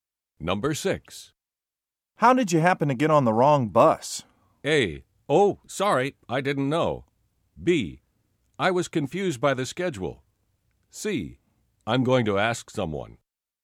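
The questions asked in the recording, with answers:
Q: How did you happen to get on the wrong bus?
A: B: I was confused by the schedule.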